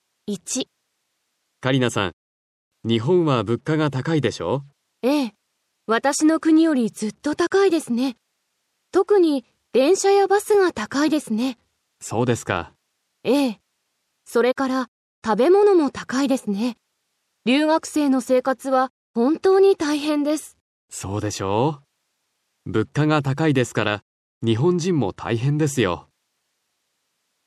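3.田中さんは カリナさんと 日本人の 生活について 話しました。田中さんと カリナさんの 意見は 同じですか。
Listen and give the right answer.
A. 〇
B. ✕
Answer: 〇

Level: Cơ bản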